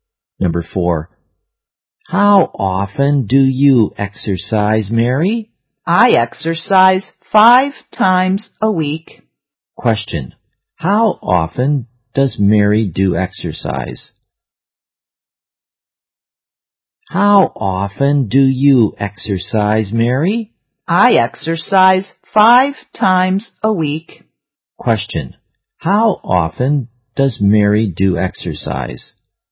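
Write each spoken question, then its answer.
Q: Question, how often does Mary do exercise?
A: Five times a week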